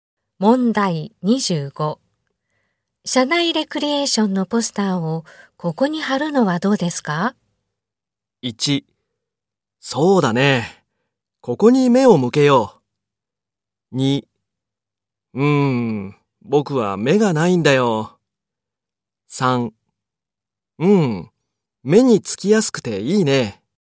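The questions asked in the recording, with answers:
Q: 社内レクリエーションのポスターをここに貼るのはどうですか?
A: 3: 目につきやすくていいね。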